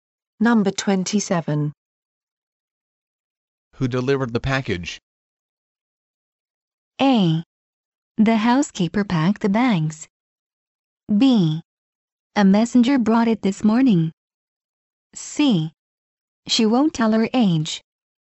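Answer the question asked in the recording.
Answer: B: A messenger brought it this morning.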